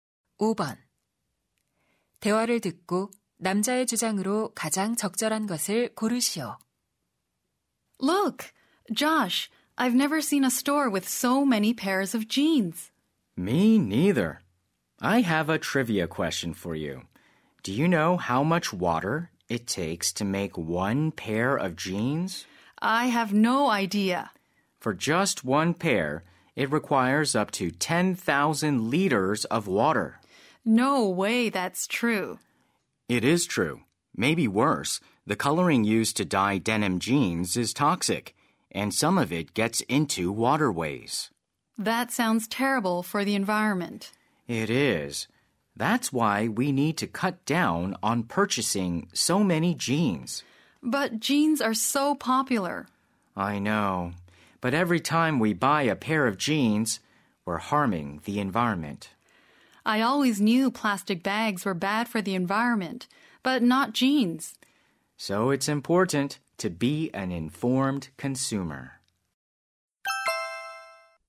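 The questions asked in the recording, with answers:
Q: 대화를 듣고 남자의 주장으로 가장 적절한 것을 고르시오.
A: 환경을 위해 청바지 구매를 줄여야 한다.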